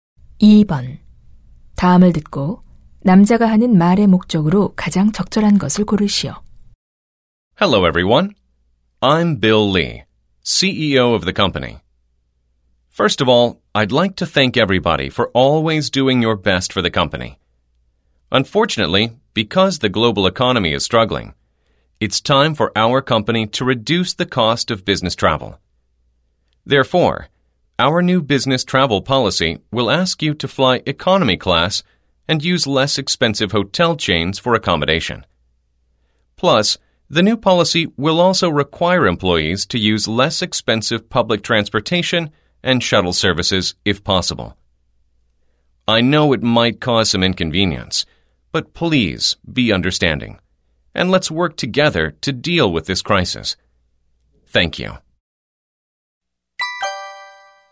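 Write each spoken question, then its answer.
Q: 다음을 듣고 남자가 하는 말의 목적으로 가장 적절한 것을 고르시오.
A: 비용 절감을 위한 새 출장 정책을 알리려고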